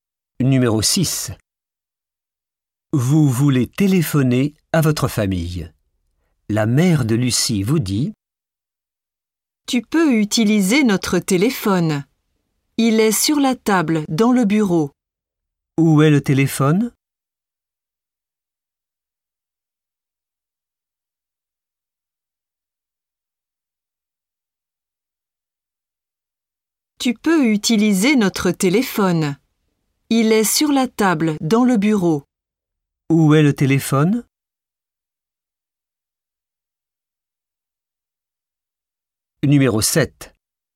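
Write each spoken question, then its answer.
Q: Où est le téléphone?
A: Sur la table, dans le bureau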